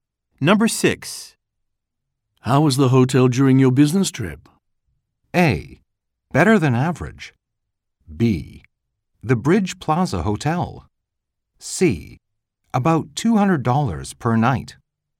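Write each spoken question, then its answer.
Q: How was the hotel during your business trip?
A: A: Better than average.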